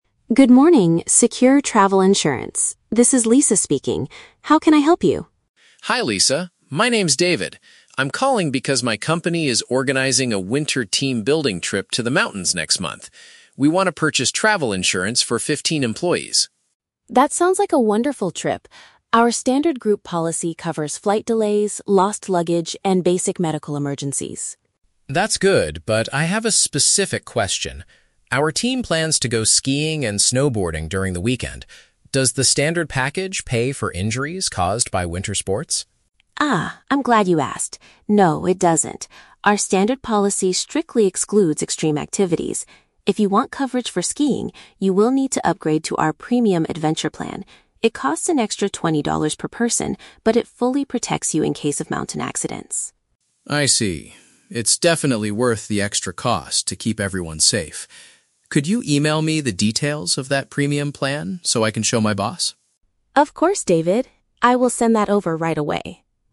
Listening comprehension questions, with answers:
Listen to the telephone conversation between a project manager and an insurance agent. Choose the correct answer (A, B, or C) for each question.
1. Why is David calling the insurance agency?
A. To report a medical emergency during a recent mountain trip.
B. To arrange financial protection for his staff's upcoming vacation.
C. To complain about a delayed flight and lost company luggage.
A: B. To arrange financial protection for his staff's upcoming vacation.

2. What is the limitation of the standard travel policy?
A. It does not provide compensation for extreme sports accidents.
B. It only covers medical costs if the group is smaller than fifteen people.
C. It is too expensive for a normal company team-building event.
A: A. It does not provide compensation for extreme sports accidents.

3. What does David decide to do at the end of the conversation?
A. Ask his boss to cancel the skiing activity to save twenty dollars.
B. Buy the basic package because it is completely enough for their needs.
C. Request more written information about the upgraded insurance option.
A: C. Request more written information about the upgraded insurance option.

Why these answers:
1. David says, "We want to purchase travel insurance for fifteen employees." "Arrange financial protection" is a paraphrase of purchasing insurance, and "staff" is a synonym for employees. Why the traps are wrong: Option A is a trap; the audio mentions "medical emergencies" and "mountains", but the trip is happening "next month" (not recent), and no one is hurt yet. Option C is a trap using the exact words "flight delays" and "lost luggage" from the audio, but those are just features of the policy, not his reason for calling.
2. The agent states that the standard policy "strictly excludes extreme activities." This means it does not provide compensation (pay) for injuries caused by sports like skiing or snowboarding. Why the traps are wrong: Option B is a plausible rule, but the number fifteen is just the size of David's team, not an insurance limit. Option C is a trap; the standard plan's cost isn't complained about; David actually says the extra money for the premium plan is "worth the extra cost".
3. David asks the agent to "email me the details of that premium plan". Requesting "written information" matches asking for an email, and "upgraded insurance option" matches the premium plan. Why the traps are wrong: Option A is a trap using the words "boss" and "twenty dollars", but David thinks the safety is worth the money, so he isn't canceling the trip. Option B is incorrect because he explicitl

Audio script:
Agent: Good morning, Secure Travel Insurance. This is Lisa speaking. How can I help you?
David: Hi Lisa, my name is David. I'm calling because my company is organizing a winter team-building trip to the mountains next month. We want to purchase travel insurance for fifteen employees.
Agent: That sounds like a wonderful trip! Our standard group policy covers flight delays, lost luggage, and basic medical emergencies.
David: That's good, but I have a specific question. Our team plans to go skiing and snowboarding during the weekend. Does the standard package pay for injuries caused by winter sports?
Agent: Ah, I'm glad you asked. No, it doesn't. Our standard policy strictly excludes extreme activities. If you want coverage for skiing, you will need to upgrade to our "Premium Adventure" plan. It costs an extra twenty dollars per person, but it fully protects you in case of mountain accidents.
David: I see. It's definitely worth the extra cost to keep everyone safe. Could you email me the details of that premium plan so I can show my boss?
Agent: Of course, David. I will send that over right away.

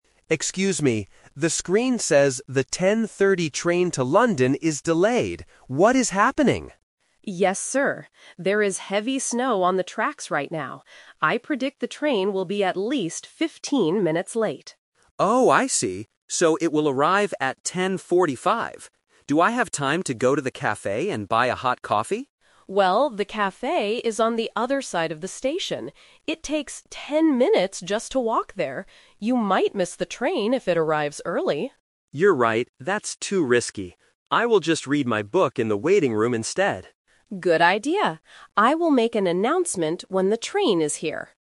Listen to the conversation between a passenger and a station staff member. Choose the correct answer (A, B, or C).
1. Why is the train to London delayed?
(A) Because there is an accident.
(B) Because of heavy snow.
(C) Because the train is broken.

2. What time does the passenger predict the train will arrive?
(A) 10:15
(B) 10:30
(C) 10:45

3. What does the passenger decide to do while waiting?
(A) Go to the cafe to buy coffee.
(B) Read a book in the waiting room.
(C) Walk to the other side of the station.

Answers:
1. (B) Because of heavy snow.
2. (C) 10:45
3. (B) Read a book in the waiting room.

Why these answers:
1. The staff member clearly states, "There is heavy snow on the tracks right now."
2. The train was originally scheduled for 10:30, and the staff predicts a 15-minute delay. The passenger confirms: "So it will arrive at 10:45."
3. The passenger thinks walking to the cafe is too risky, so he says, "I will just read my book in the waiting room instead."

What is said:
The screen says the 10:30 train to London is delayed. What is happening?
Staff: Yes, sir. There is heavy snow on the tracks right now. I predict the train will be at least 15 minutes late.
Passenger: Oh, I see. So it will arrive at 10:45. Do I have time to go to the cafe and buy a hot coffee?
Staff: Well, the cafe is on the other side of the station. It takes 10 minutes just to walk there. You might miss the train if it arrives early.
Passenger: You're right. That's too risky. I will just read my book in the waiting room instead.

